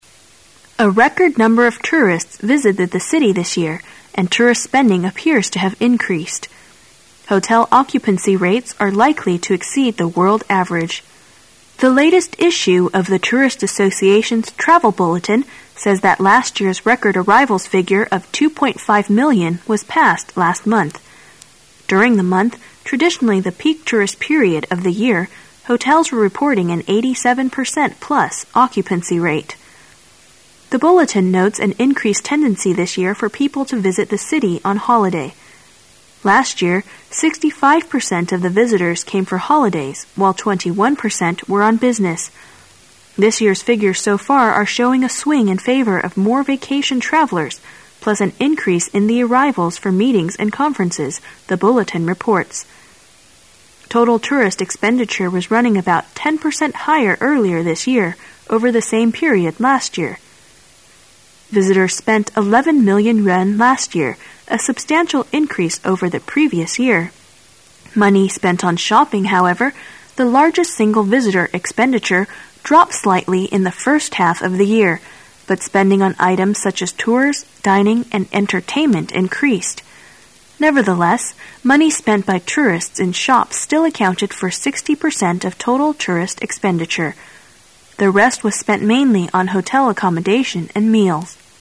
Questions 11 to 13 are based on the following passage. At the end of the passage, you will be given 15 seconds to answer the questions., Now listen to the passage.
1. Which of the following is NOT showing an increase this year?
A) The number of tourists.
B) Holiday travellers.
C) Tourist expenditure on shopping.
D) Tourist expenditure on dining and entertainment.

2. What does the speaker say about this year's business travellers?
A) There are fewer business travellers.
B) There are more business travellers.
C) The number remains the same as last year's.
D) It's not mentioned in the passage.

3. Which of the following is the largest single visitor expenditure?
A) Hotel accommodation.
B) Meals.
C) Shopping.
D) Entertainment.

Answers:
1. C) Tourist expenditure on shopping.
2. B) There are more business travellers.
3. C) Shopping.

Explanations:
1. 本题测试对全文的整体理解和归纳推理能力。在理解全文大意的基础上,抓住关键信 息,如"A record number of tourists","showing a swing in favour of more vacation travellers","shopping...dropped slightly","dining and entertainment increased" 等可以使我们了解除了购物有所下降外,其他几个项目都有所上升,因此正确答案为C。 spending n.开销,花费 occupancy rate占有率 exceed v.超越,胜过 bulletin n.公告,报告 peak n .最高峰 swing n.摇摆,摆动
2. 本题测试对细节内容的理解和推理能力。根据文中的相关信息"an increase in the arrivals for meetings and conferences",可知因开会而来的游客也呈上升状态,因此正确答案为B。 expenditure n.支出,花费 substantial adj 坚固的,实质的,充实的 previous adj;.在前的,早先的
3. 本题测试对细节内容的理解。根据文中的相关信息"shopping,however—the largest single visitor expenditure",可直接找到正确答案C。 account for占,说明 accommodation n.住处,食宿,(车、船、飞机等的)预定铺位

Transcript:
[解析] 11-13 A record number of tourists visited the city this year, and tourist spending appears to have increased. Hotel occupancy rates are likely to exceed the world average. The latest issue of the Tourist Association's Travel Bulletin says that last year's record arrivals figure of 2.5 million was passed last month. During the month, traditionally the peak tourist period of the year, hotels were reporting an 87 per cent plus occupancy rate. The Bulletin notes an increased tendency this year for people to visit the city on holiday. Last year, 65 per cent of the visitors came for holidays while 21 per cent were on business. "This year's figures so far are showing a swing in favour of more vacation travellers plus an increase in the arrivals for meetings and conferences," the Bulletin reports. Total tourist expenditure was running about 10 per cent higher earlier this year over the same period last year. Visitors spent 11 million yuan last year, a substantial increase over the previous year. Money spent on shopping, however -- the largest single visitor expenditure -- dropped slightly in the first half of the year, but spending on items suchas tours, dining and entertainment increased. Nevertheless, money spent by tourists in shops still accounted for 60 per cent of total tourist expenditure. The rest was spent mainly on hotel accommodation and meals.

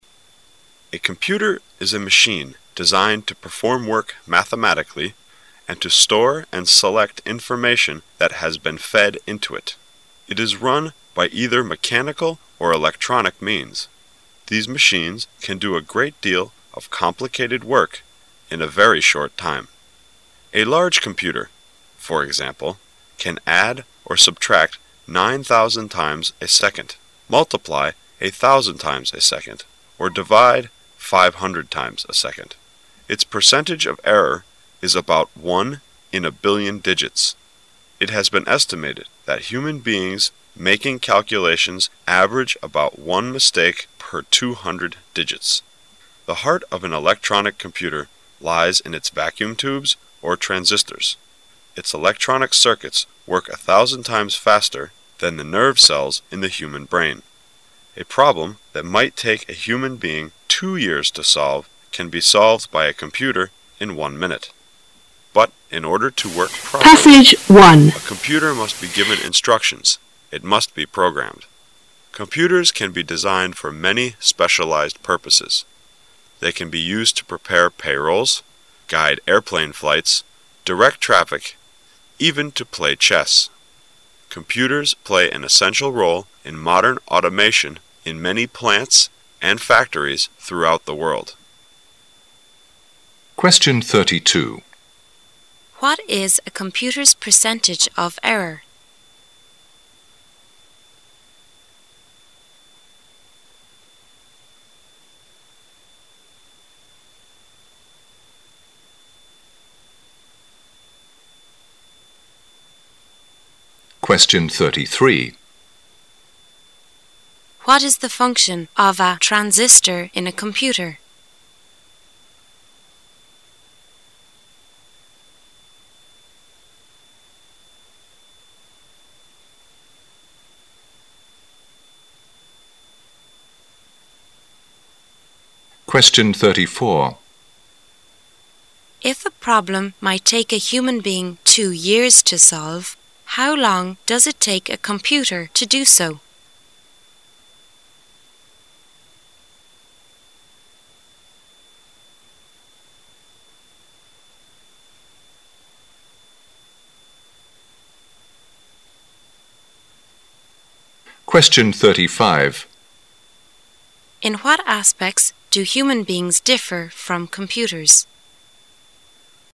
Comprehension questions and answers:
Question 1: What is the function of a transistor in a computer?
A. It is the nerve cells of a computer.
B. It is the brain of a computer.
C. It is the eye of a computer.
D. It is the heart of a computer.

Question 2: If a problem might take a human being two years to solve, how long does it take a computer to do so?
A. One second.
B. Two years.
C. One minute.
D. A day.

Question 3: In what aspect do human beings differ from computers?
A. Human beings make fewer errors.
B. Human beings do not have to be programmed.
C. Human beings work more quickly.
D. Human beings have to be programmed.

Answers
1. D. It is the heart of a computer.
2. C. One minute.
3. B. Human beings do not have to be programmed.

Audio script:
[解析] 32-35 A computer is a machine designed to perform work mathematically and to store and select information that has been fed into it. It is run by either mechanical or electronic means. These machines can do a great deal of complicated work in a very short time. A large computer, for example, can add or subtract nine thousand times a second, multiply a thousand times a second, or divide five hundred times a second. Its percentage of error is about one in a billion digits. It has been estimated that human beings making calculations average about one mistake per two hundred digits. The heart of an electronic computer lies in its vacuum tubes, or transistors. Its electronic circuits work a thousand times faster than the nerve cells in the human brain. A problem that might take a human being two years to solve can be solved by a computer in one minute, but in order to work properly, a computer must be given instructions--it must be programmed. Computers can be designed for many specialized purposes--they can be used to prepare payrolls, guide airplane flights, direct traffic, even to play chess. Computers play an essential role in modern automation in many plants and factories throughout the world. What is a computer's percentage of error?

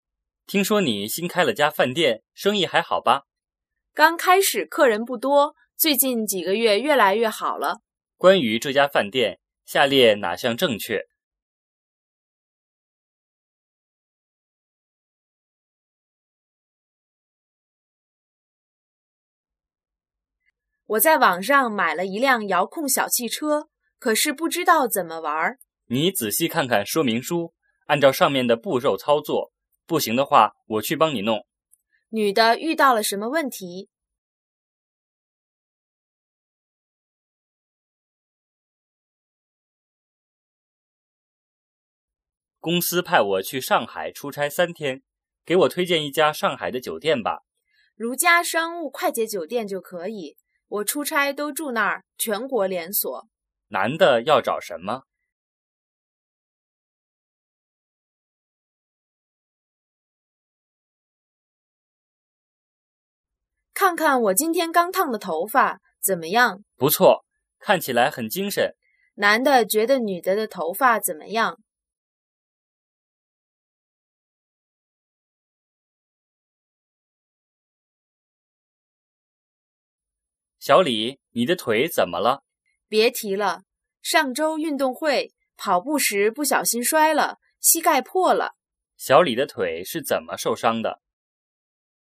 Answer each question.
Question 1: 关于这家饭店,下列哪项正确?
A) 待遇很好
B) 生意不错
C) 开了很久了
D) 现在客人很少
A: B) 生意不错

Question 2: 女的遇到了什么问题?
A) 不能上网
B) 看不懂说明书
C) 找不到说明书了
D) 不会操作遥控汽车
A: D) 不会操作遥控汽车

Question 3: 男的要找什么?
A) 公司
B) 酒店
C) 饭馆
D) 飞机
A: B) 酒店

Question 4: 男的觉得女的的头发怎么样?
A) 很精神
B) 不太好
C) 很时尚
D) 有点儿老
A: A) 很精神

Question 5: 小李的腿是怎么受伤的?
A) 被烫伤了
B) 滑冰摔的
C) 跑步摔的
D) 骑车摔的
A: C) 跑步摔的

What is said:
男:听说你新开了家饭店,生意还好吧?
女:刚开始客人不多,最近几个月越来越好了。
问:关于这家饭店,下列哪项正确?
女:我在网上买了一辆遥控小汽车,可是不知道怎么玩。
男:你仔细看看说明书,按照上面的步骤操作,不行的话我去帮你弄。
问:女的遇到了什么问题?
男:公司派我去上海出差三天,给我推荐一家上海的酒店吧。
女:如家商务快捷酒店就可以,我出差都住那儿,全国连锁。
问:男的要找什么?
女:看看我今天刚烫的头发,怎么样?
男:不错,看起来很精神。
问:男的觉得女的的头发怎么样?
男:小李,你的腿怎么了?
女:别提了,上周运动会跑步时不小心摔了,膝盖破了。
问:小李的腿是怎么受伤的?

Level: 汉语水平考试(HSK)五级

